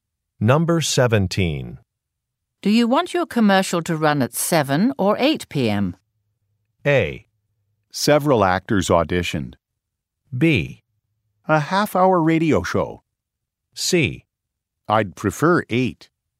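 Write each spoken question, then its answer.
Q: Do you want your commercial to run at 7 or 8 p.m.?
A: C: I'd prefer 8.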